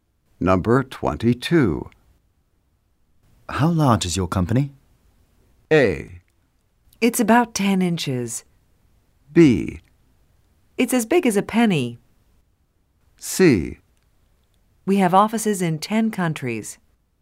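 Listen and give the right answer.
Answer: C: We have offices in 10 countries.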